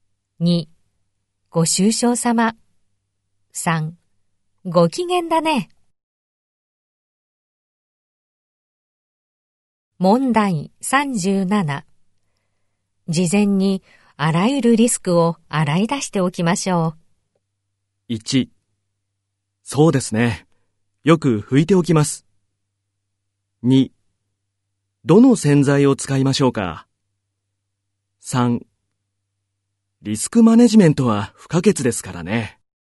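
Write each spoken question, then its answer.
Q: 事前にあらゆるリスクを洗い出しておきましょう。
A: 3: リスクマネジメントは不可欠ですからね。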